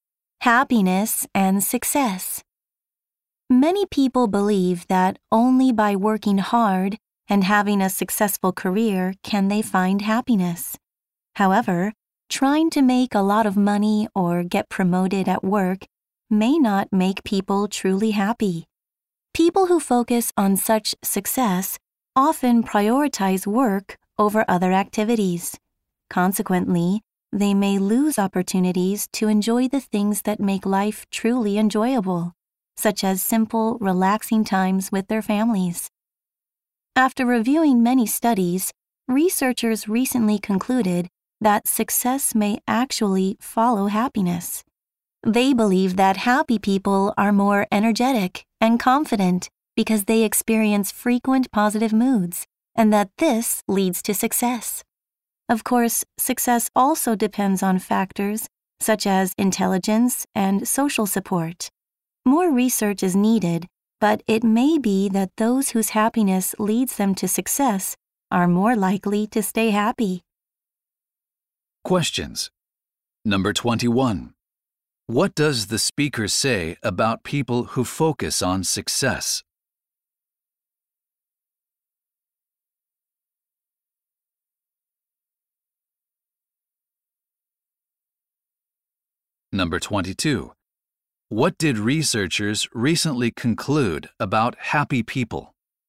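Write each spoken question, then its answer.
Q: What does the speaker say about people who focus on success?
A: They often put work before other activities and may miss out on things that make life enjoyable, like relaxing time with their families.

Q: What did researchers recently conclude about happy people?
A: Success may follow happiness: happy people are more energetic and confident, which leads to success.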